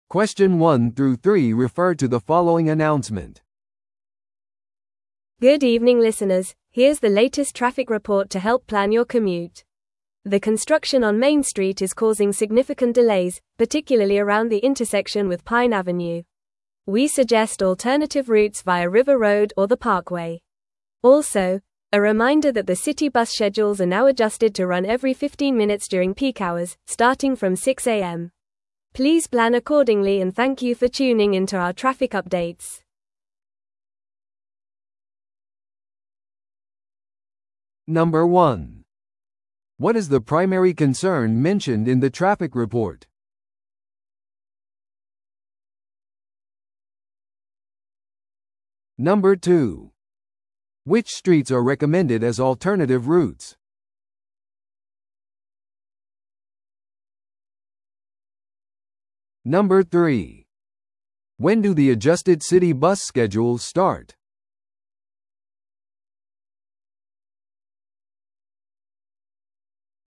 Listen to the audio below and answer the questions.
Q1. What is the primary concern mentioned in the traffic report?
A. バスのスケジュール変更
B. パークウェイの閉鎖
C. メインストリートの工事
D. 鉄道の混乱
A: C. メインストリートの工事

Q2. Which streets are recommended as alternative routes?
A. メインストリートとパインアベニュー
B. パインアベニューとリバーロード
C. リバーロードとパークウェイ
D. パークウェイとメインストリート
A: C. リバーロードとパークウェイ

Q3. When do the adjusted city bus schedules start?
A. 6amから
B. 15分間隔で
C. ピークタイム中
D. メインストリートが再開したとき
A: A. 6amから

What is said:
Good evening listeners, here's the latest traffic report to help plan your commute. The construction on Main Street is causing significant delays, particularly around the intersection with Pine Avenue. We suggest alternative routes via River Road or the Parkway. Also, a reminder that the city bus schedules are now adjusted to run every 15 minutes during peak hours, starting from 6am. Please plan accordingly and thank you for tuning in to our traffic updates.

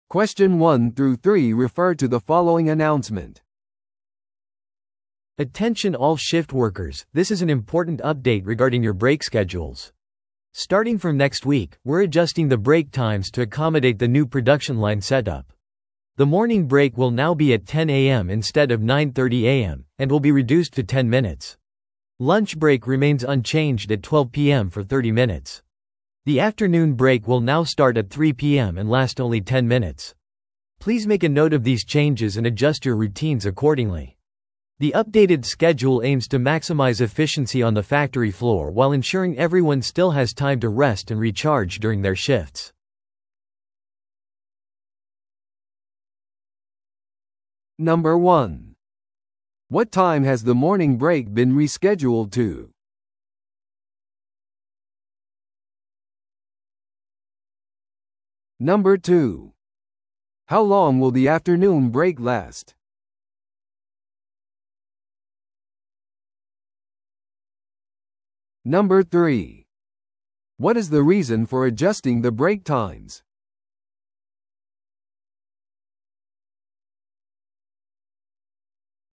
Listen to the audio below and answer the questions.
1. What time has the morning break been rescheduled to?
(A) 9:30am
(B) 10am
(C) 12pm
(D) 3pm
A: (B) 10am

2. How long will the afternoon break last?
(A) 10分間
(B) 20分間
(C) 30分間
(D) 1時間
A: (A) 10分間

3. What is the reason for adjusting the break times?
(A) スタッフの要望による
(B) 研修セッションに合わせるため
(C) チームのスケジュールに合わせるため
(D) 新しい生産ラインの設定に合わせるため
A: (D) 新しい生産ラインの設定に合わせるため

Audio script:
Attention all shift workers, this is an important update regarding your break schedules. Starting from next week, we're adjusting the break times to accommodate the new production line setup. The morning break will now be at 10am instead of 9:30am, and will be reduced to 10 minutes. Lunch break remains unchanged at 12pm for 30 minutes. The afternoon break will now start at 3pm and last only 10 minutes. Please make a note of these changes and adjust your routines accordingly. The updated schedule aims to maximize efficiency on the factory floor while ensuring everyone still has time to rest and recharge during their shifts.

